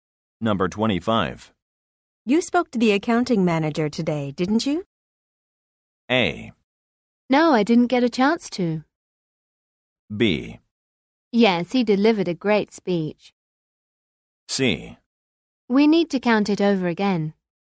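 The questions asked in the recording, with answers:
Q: You spoke to the accounting manager today, didn't you?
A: A: No, I didn't get a chance to.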